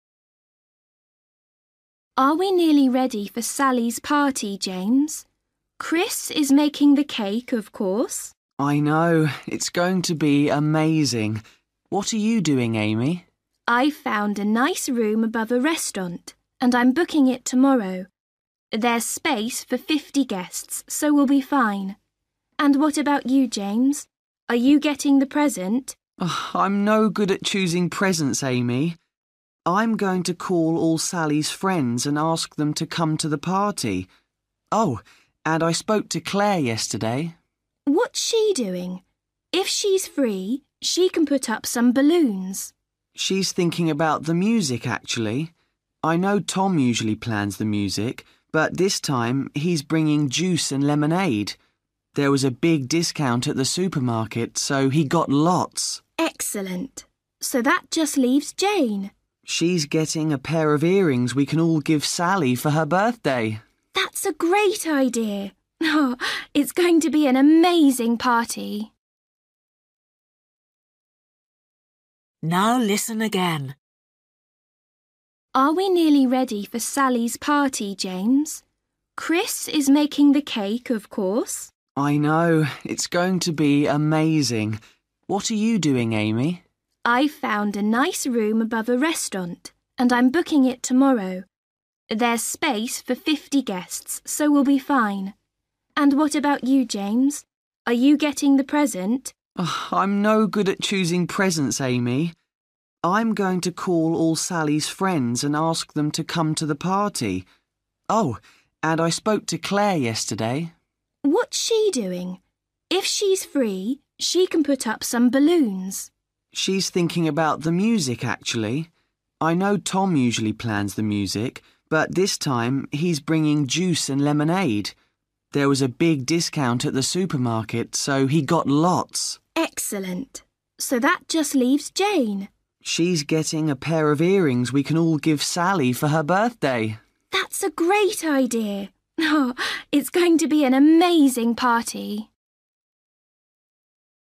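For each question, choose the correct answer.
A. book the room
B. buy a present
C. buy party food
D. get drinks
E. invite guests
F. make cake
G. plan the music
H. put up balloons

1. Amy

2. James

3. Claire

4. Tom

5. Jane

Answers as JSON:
{"1": "A", "2": "E", "3": "G", "4": "D", "5": "B"}

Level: Luyện nghe trình độ A2

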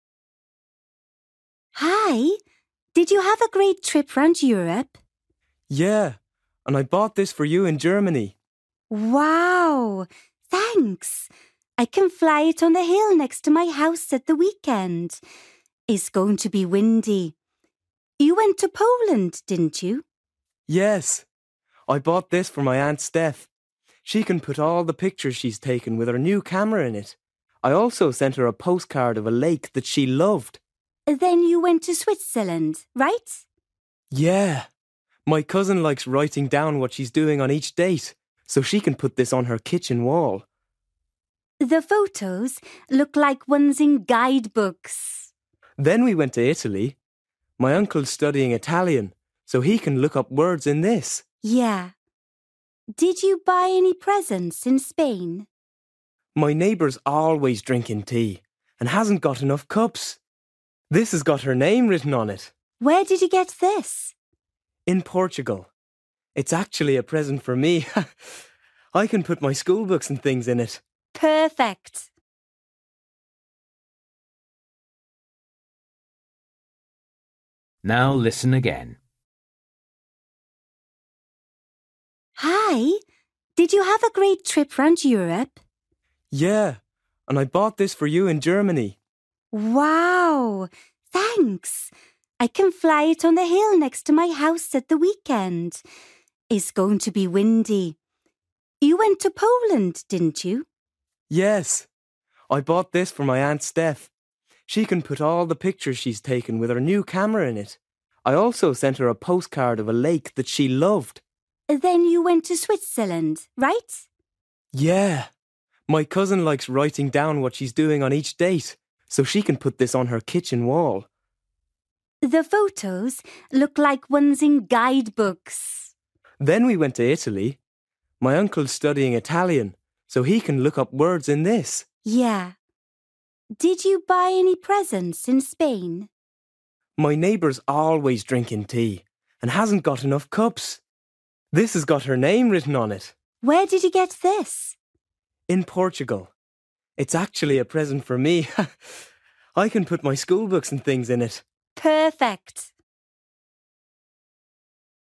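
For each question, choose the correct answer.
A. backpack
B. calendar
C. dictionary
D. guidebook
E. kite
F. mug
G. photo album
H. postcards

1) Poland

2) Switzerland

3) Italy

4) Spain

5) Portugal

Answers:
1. G
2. B
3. C
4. F
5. A

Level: Luyện nghe trình độ A2

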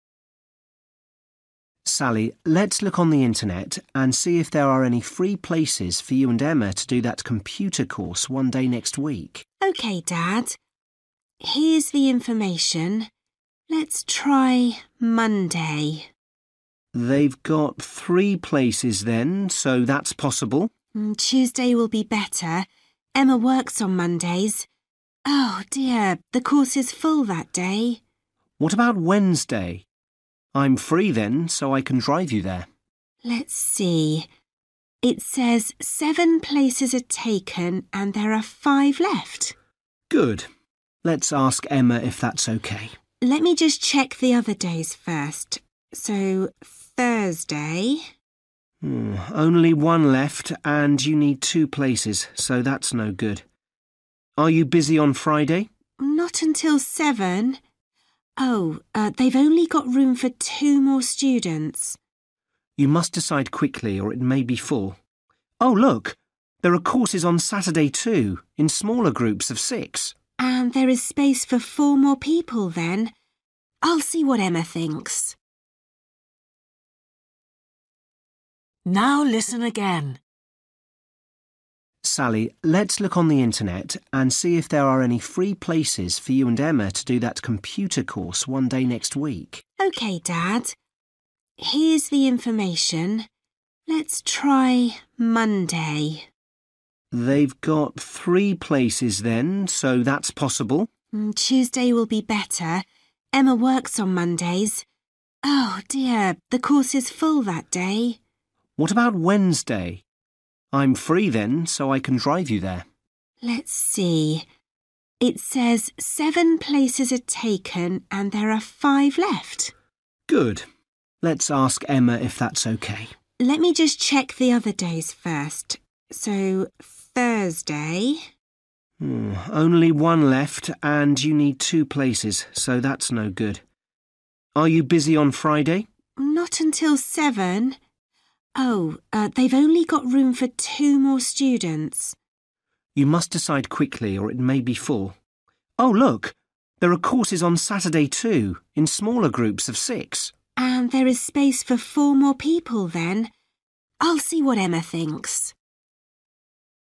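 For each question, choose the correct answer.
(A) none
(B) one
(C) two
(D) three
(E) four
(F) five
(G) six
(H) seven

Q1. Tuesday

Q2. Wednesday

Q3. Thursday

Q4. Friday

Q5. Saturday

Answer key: 1A, 2F, 3B, 4C, 5E

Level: Luyện nghe trình độ A2

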